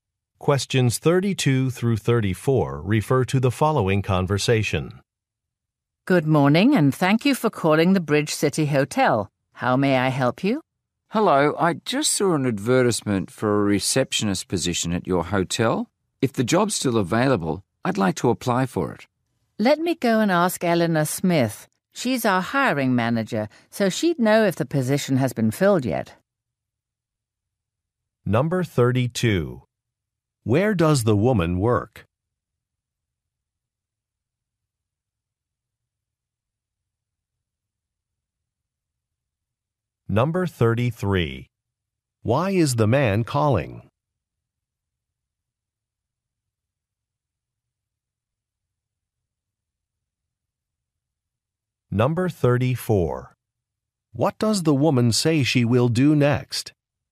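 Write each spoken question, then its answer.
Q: Where does the woman work?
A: At a hotel (Bridge City Hotel)

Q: Why is the man calling?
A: To apply for a receptionist job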